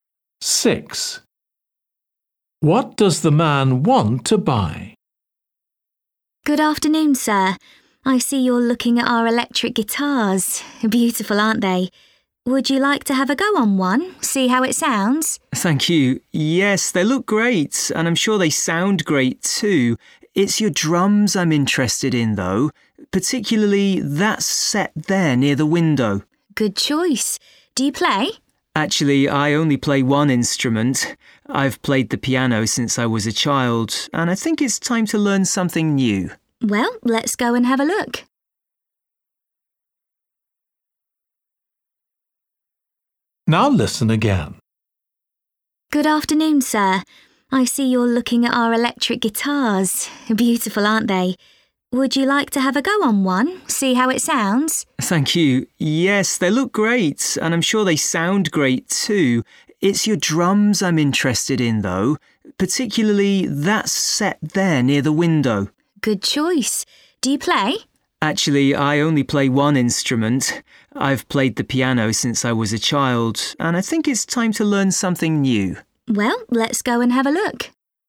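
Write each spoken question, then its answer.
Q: What does the man want to buy?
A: drums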